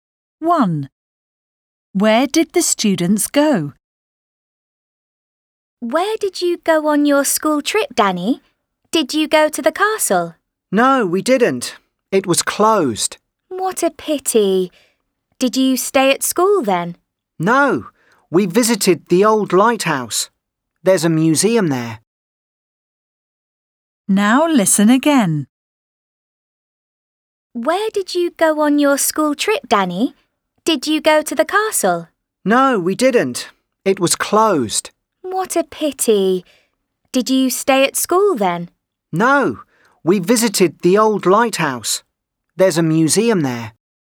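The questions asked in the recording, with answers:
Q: Where did the students go?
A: the old lighthouse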